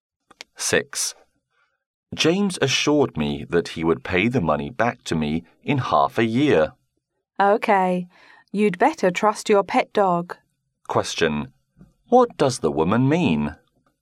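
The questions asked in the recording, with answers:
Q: What does the woman mean?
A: James can't be trusted to pay the money back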